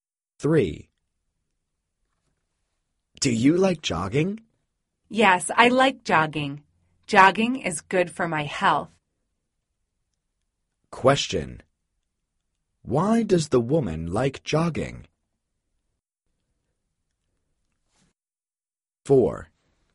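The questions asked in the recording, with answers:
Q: Why does the woman like jogging?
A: It is good for her health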